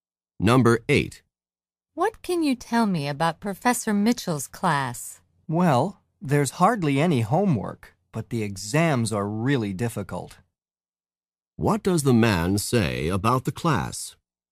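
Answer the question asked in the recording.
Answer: There's little homework, but the exams are very difficult.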